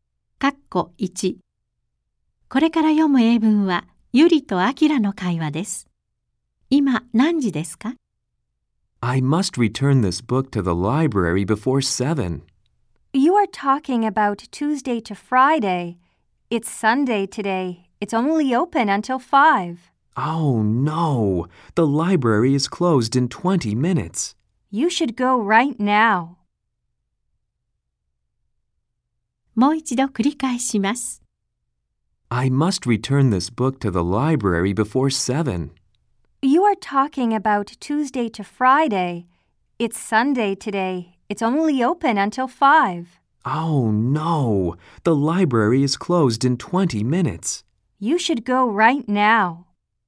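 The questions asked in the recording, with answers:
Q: 今、何時ですか?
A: 4時40分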